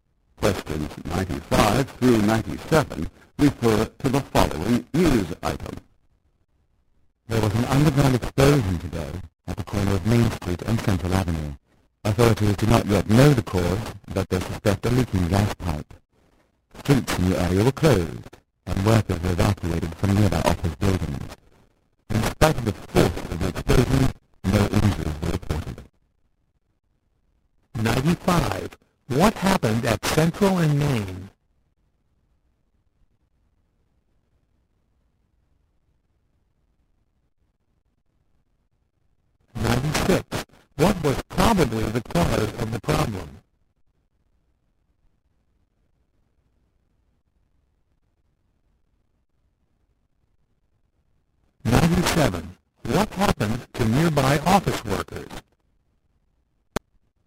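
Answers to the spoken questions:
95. An underground explosion
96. A leaking gas pipe
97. They were evacuated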